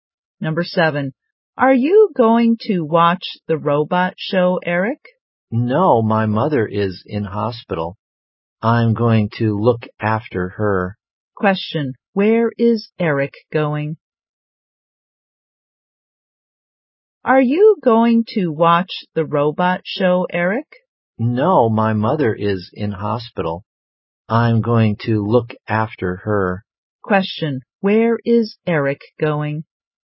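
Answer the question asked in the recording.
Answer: To the hospital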